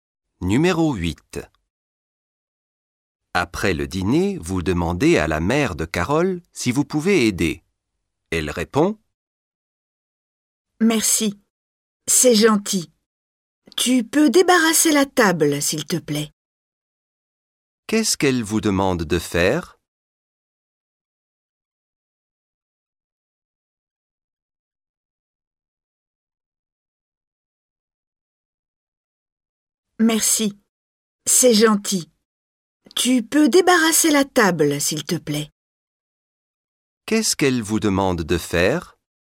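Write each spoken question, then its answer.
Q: Qu'est-ce qu'elle vous demande de faire?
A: débarrasser la table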